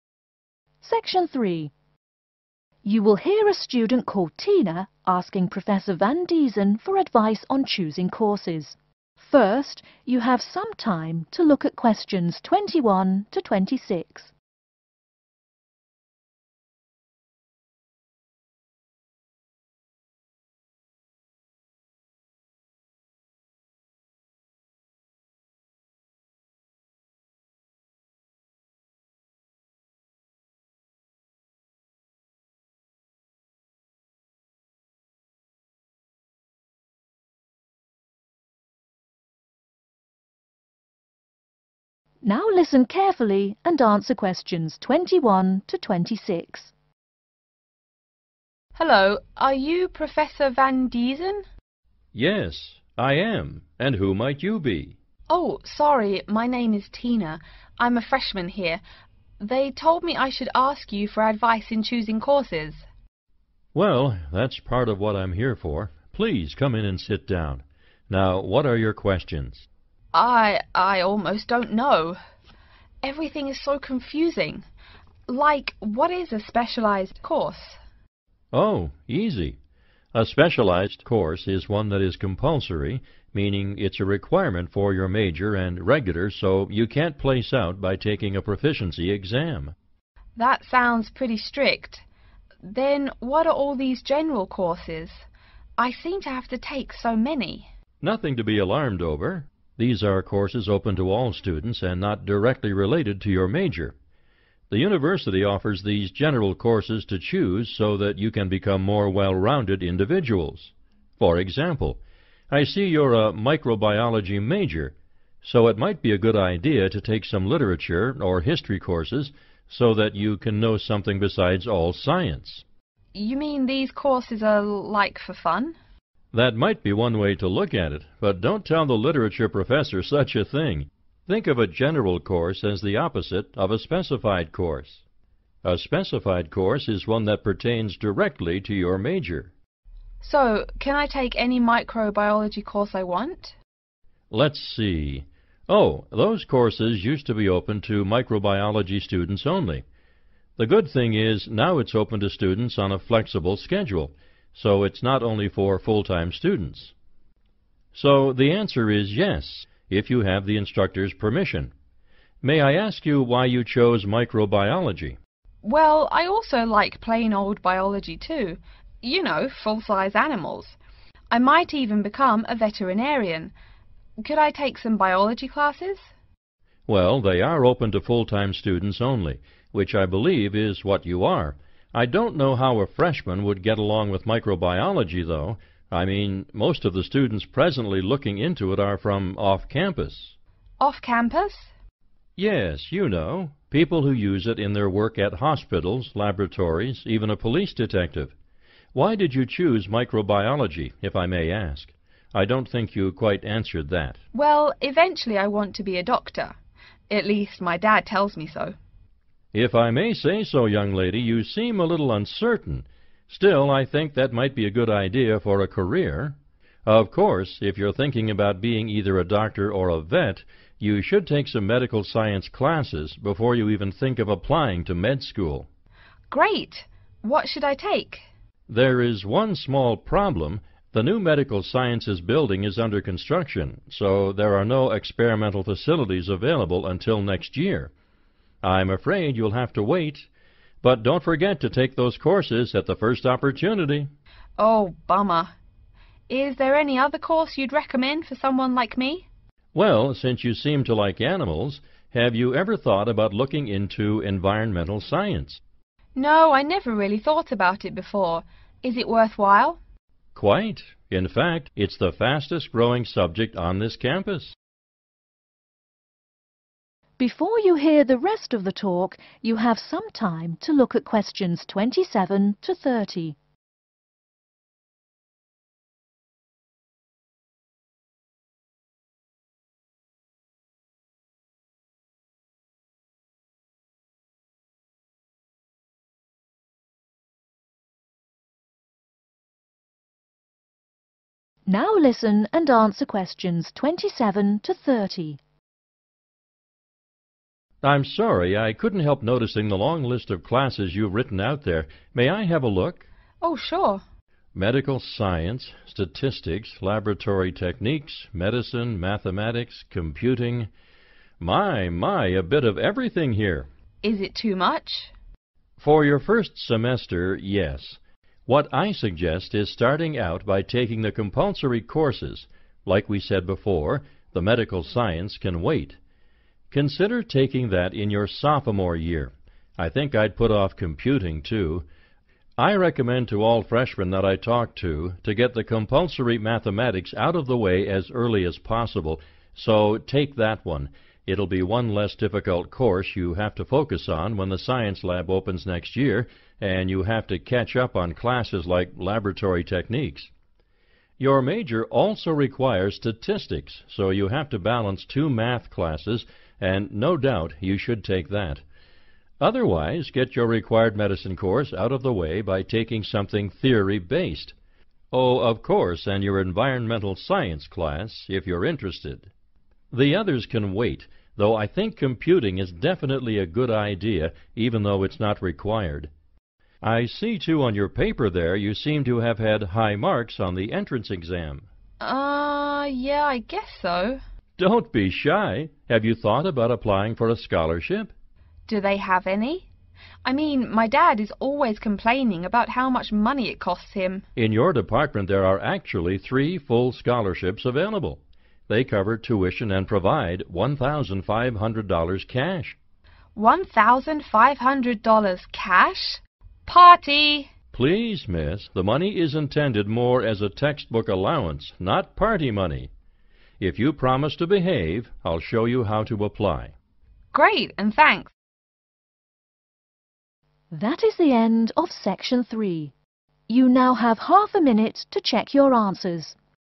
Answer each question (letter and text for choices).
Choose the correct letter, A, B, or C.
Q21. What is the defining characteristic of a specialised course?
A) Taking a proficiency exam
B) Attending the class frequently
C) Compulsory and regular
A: C) Compulsory and regular

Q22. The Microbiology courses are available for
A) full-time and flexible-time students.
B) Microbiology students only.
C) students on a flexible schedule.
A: A) full-time and flexible-time students.

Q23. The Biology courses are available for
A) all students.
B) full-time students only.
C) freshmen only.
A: B) full-time students only.

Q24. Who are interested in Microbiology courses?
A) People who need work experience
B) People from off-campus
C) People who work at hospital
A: B) People from off-campus

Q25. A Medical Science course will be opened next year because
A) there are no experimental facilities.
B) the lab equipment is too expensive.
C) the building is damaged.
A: A) there are no experimental facilities.

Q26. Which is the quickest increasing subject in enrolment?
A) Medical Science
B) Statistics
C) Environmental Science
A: C) Environmental Science

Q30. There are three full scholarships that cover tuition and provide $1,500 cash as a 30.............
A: textbook allowance